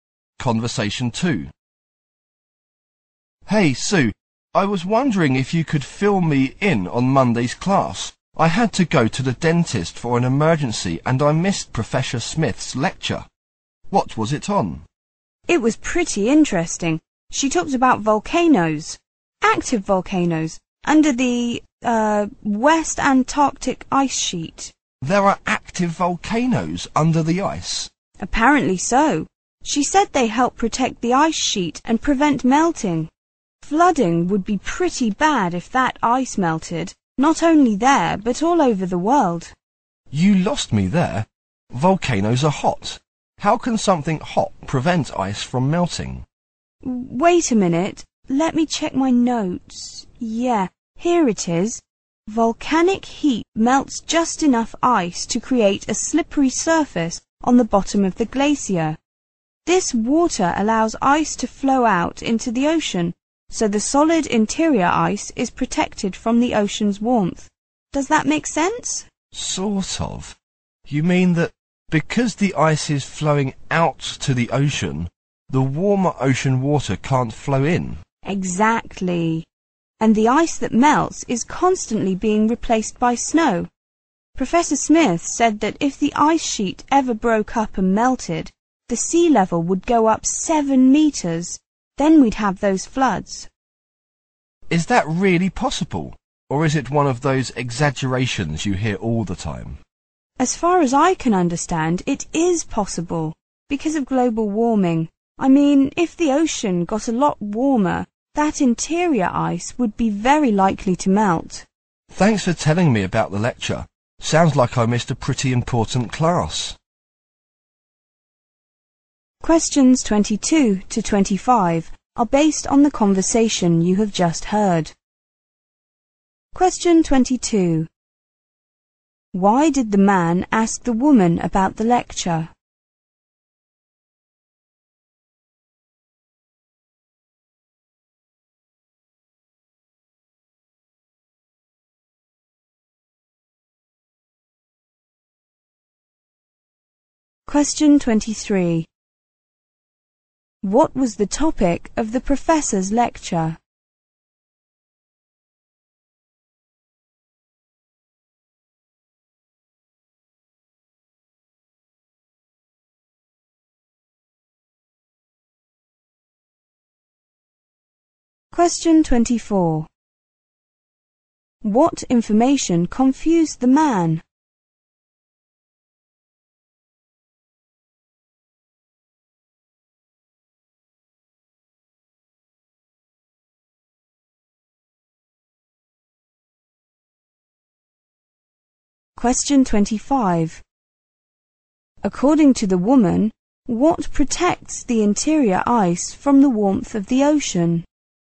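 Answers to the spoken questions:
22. He missed it because of an emergency visit to the dentist
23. Active volcanoes under the West Antarctic ice sheet
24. That hot volcanoes could prevent the ice from melting
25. Ice flowing out into the ocean over meltwater from volcanic heat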